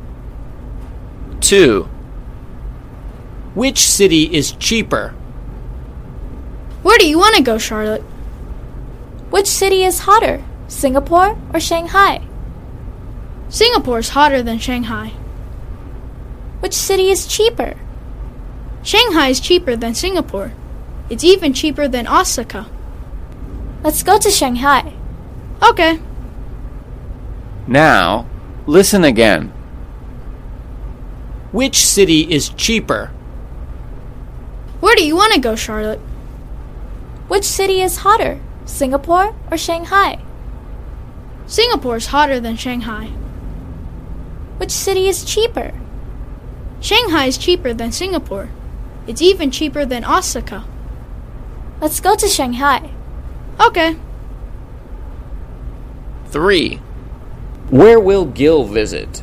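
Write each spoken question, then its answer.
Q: Which city is cheaper?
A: Shanghai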